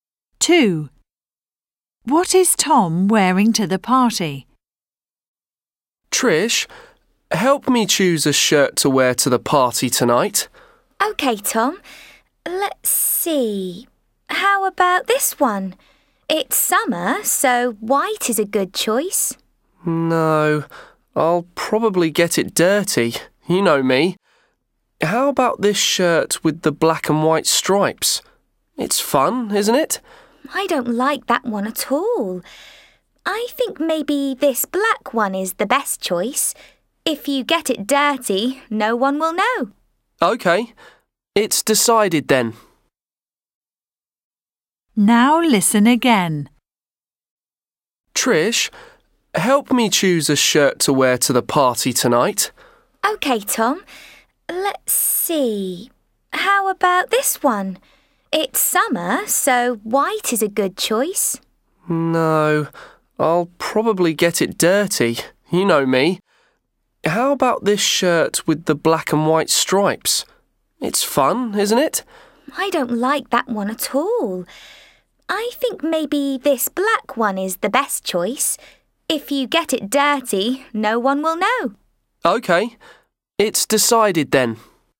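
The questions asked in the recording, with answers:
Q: What is Tom wearing to the party?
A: a black shirt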